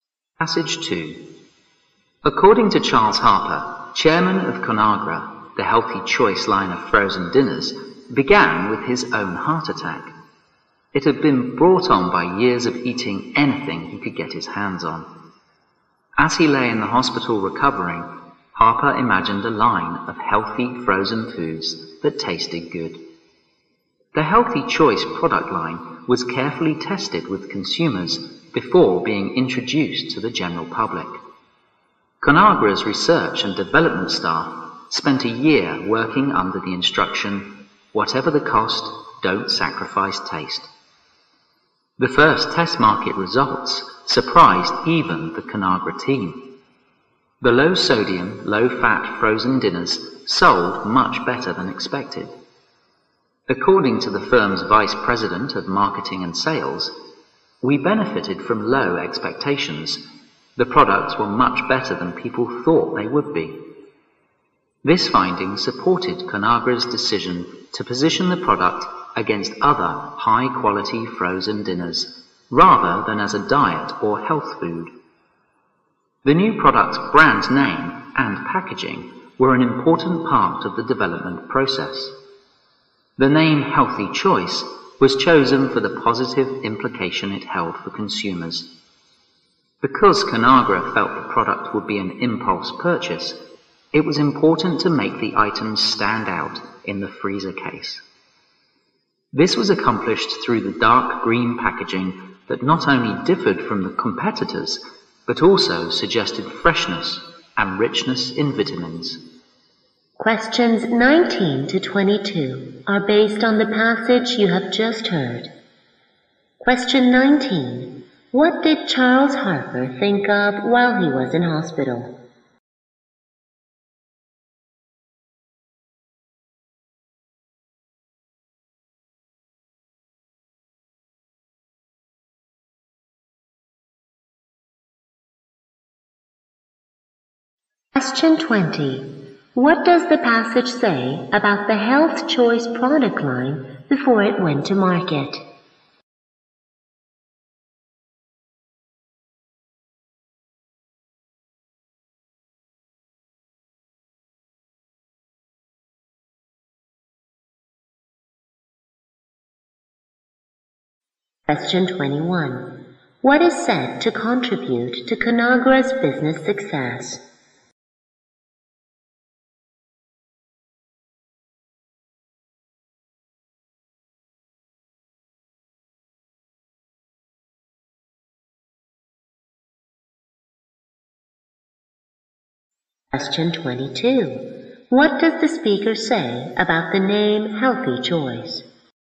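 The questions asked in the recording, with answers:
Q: What did Charles Harper think of while he was in hospital?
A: A line of healthy frozen foods that tasted good

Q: What does the passage say about the Health Choice product line before it went to market?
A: It was carefully tested with consumers

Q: What does the speaker say about the name Healthy Choice?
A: It was chosen for its positive implication for consumers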